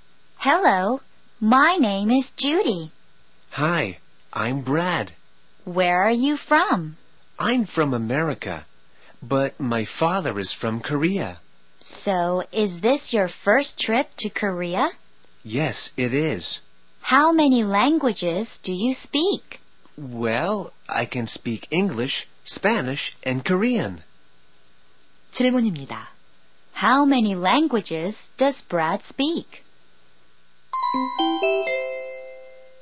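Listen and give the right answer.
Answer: Three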